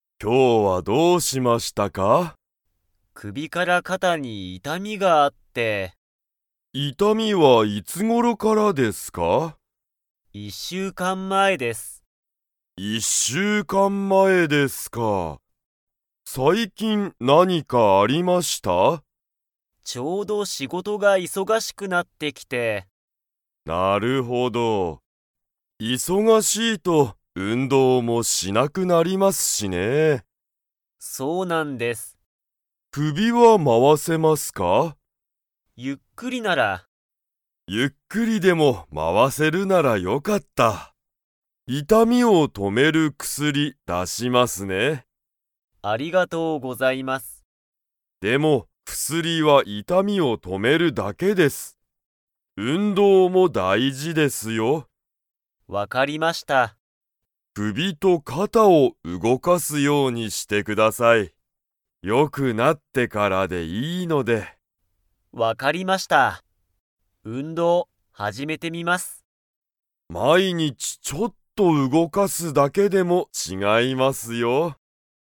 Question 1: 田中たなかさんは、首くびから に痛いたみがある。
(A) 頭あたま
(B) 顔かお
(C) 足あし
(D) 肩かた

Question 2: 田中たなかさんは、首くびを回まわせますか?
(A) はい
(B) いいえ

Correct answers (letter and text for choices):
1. (D) 肩かた
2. (A) はい

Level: Level 4